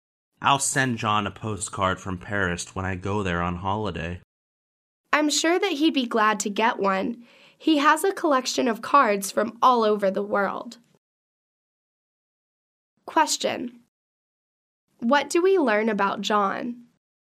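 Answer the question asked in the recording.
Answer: He collects postcards from all over the world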